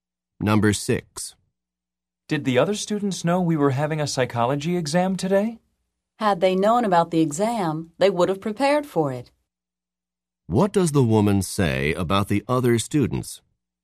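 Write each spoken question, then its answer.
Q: What does the woman say about the other students?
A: They didn't know about the exam and didn't prepare.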